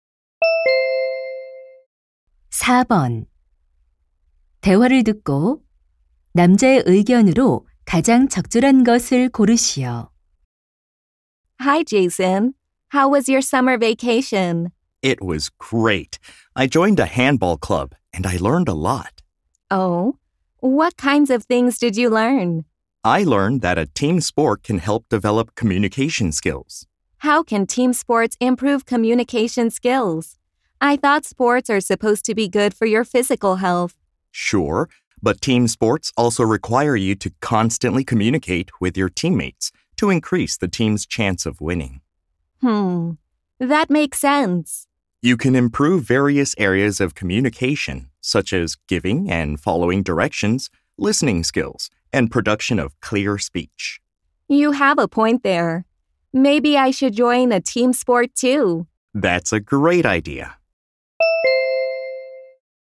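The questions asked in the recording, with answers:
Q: 대화를 듣고 남자의 의견으로 가장 적절한 것을 고르시오.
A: 단체 운동은 의사소통 능력 향상에 도움이 된다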